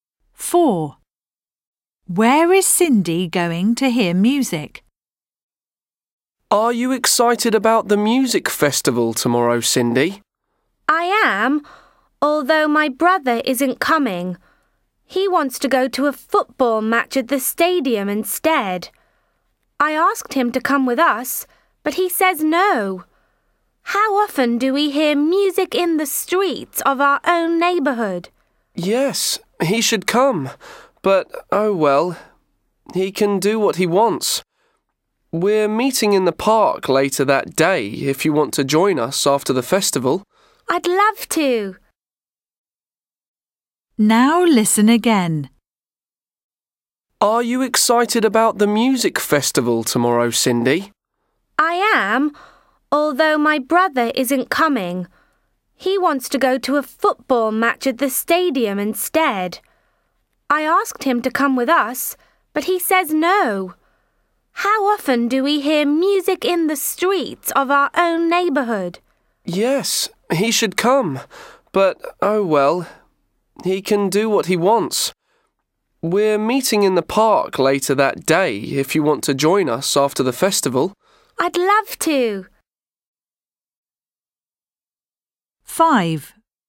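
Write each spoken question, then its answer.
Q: Where is Cindy going to hear music?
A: in the streets of her neighbourhood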